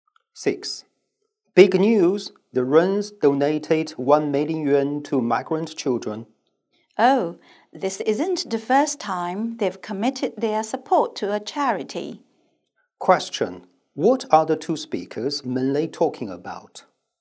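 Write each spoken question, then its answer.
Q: What are the two speakers mainly talking about?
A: The Wrens' donation to migrant children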